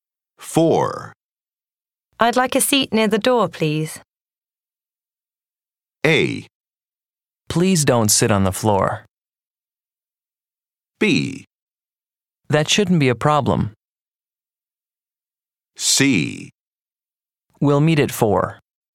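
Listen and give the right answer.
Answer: B: That shouldn't be a problem.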